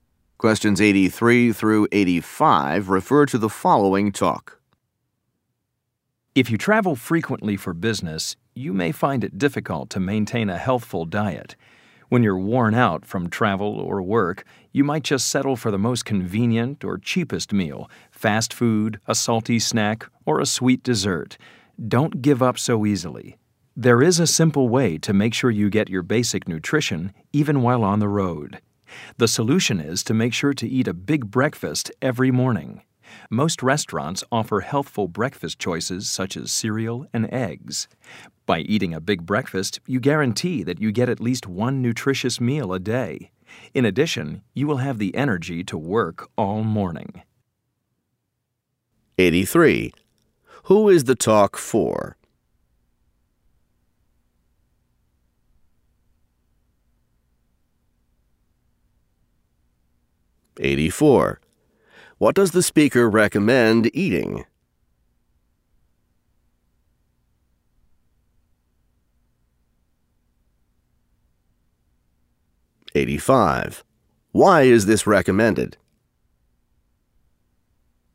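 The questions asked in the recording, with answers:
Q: Who is the talk for?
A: Business travelers

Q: What does the speaker recommend eating?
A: A big breakfast

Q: Why is this recommended?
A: To get at least one nutritious meal a day and energy for the morning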